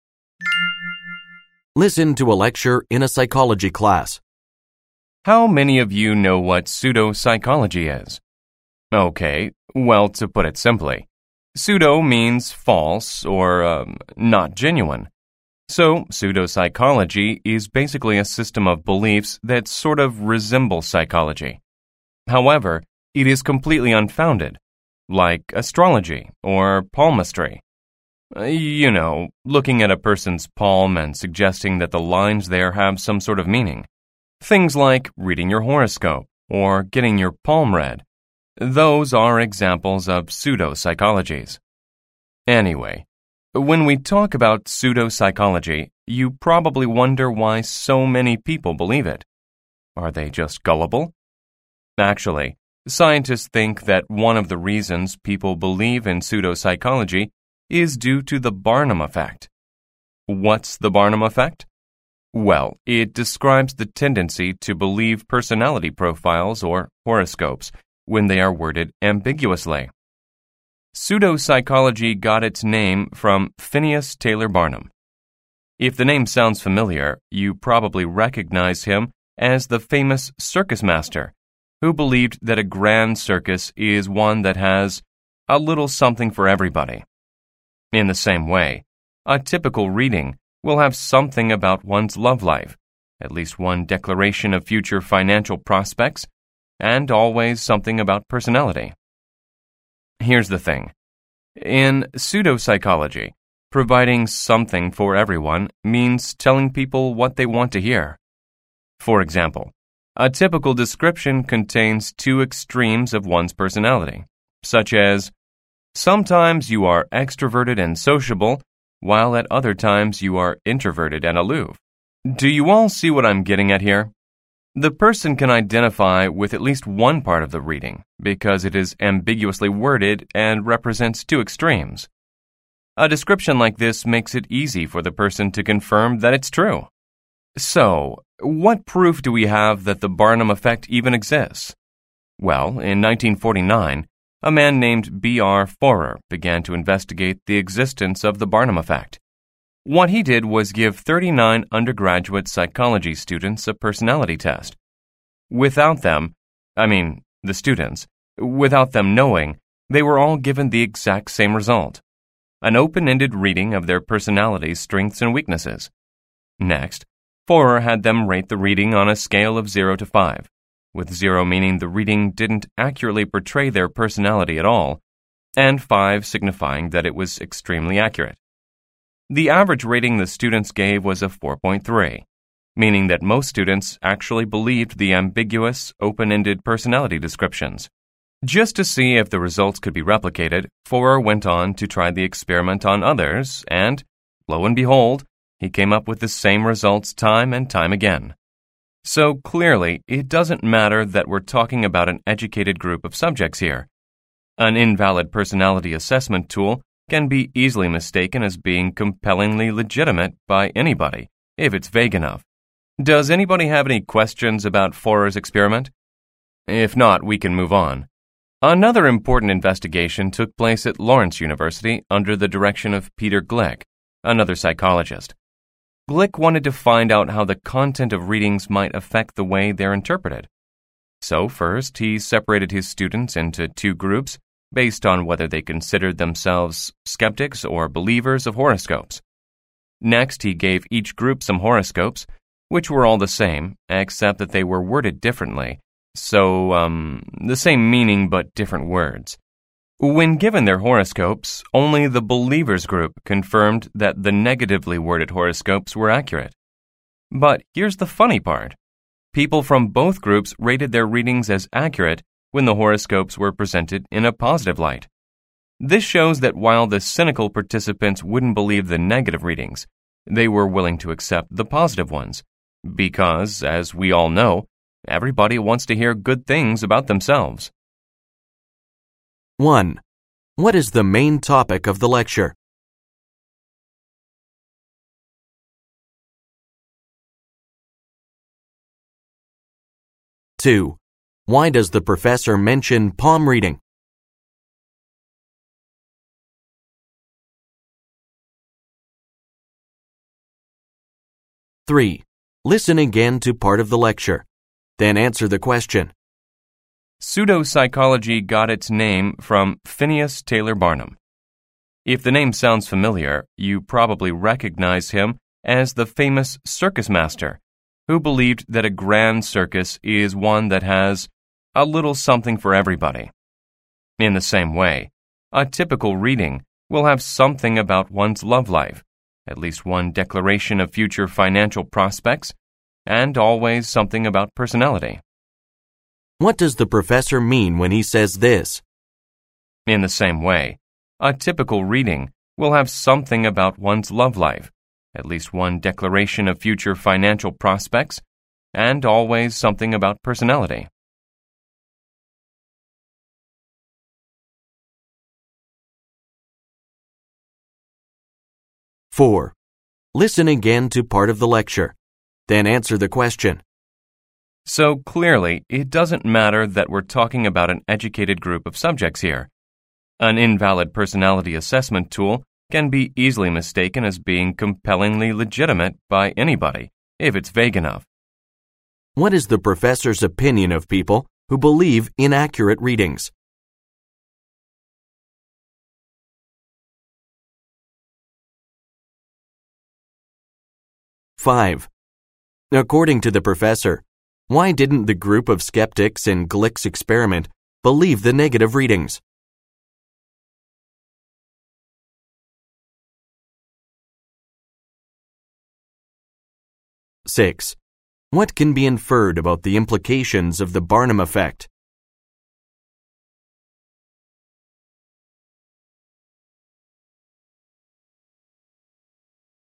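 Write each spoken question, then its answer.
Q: What is the main topic of the lecture?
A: The Barnum effect, which explains why people believe pseudo-psychology

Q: Why does the professor mention palm reading?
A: As an example of pseudo-psychology

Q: What does the professor mean when he says this?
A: Like Barnum's circus, a reading has something for everybody, so everyone finds a part that fits them

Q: What is the professor's opinion of people who believe inaccurate readings?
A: Anyone, even educated people, can be fooled by vague readings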